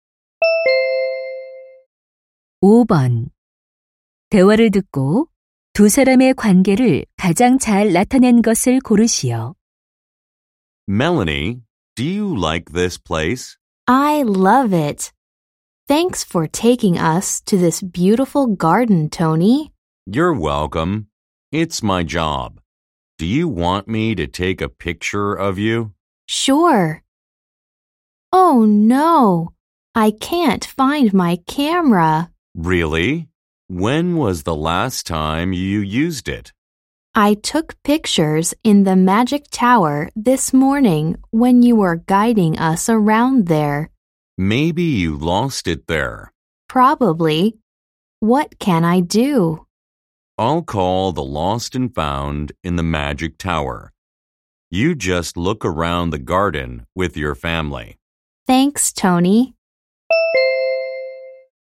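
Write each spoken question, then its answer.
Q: 대화를 듣고 두 사람의 관계를 가장 잘 나타낸 것을 고르시오.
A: 관광객 - 관광 가이드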